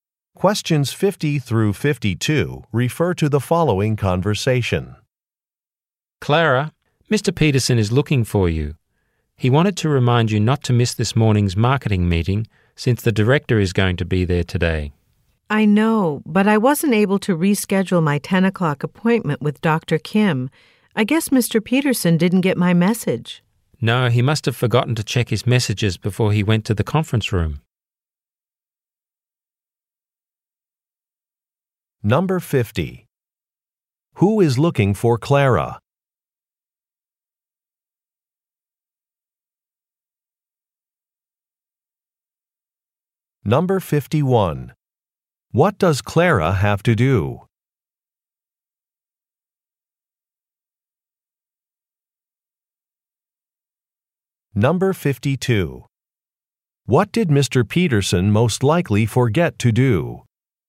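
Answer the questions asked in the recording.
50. Mr. Peterson
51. Go to her 10 o'clock appointment with Dr. Kim
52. Check his messages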